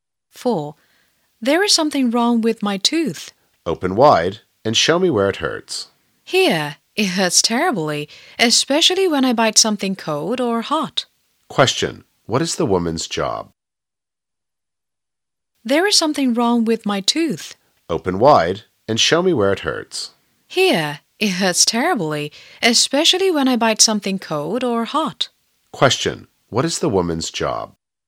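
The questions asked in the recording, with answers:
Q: What is the woman's job?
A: A dentist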